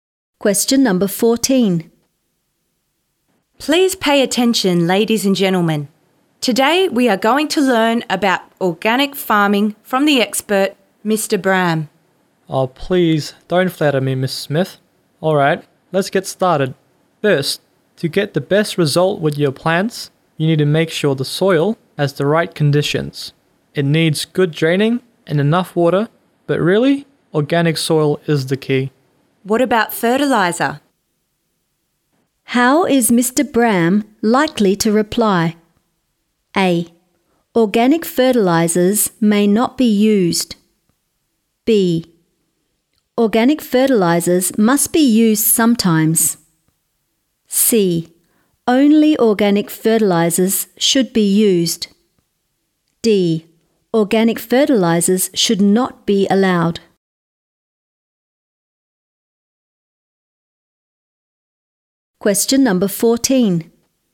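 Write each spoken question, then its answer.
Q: How is Mr. Bram likely to reply?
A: C: Only organic fertilizers should be used.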